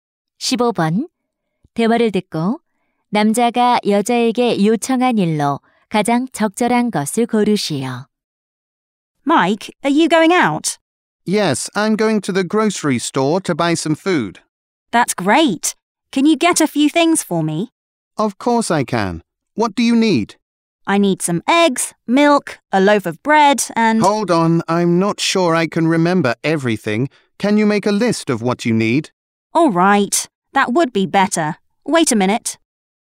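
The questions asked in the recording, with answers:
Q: 대화를 듣고 남자가 여자에게 요청한 일로 가장 적절한 것을 고르시오.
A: 필요한 물건 목록 작성하기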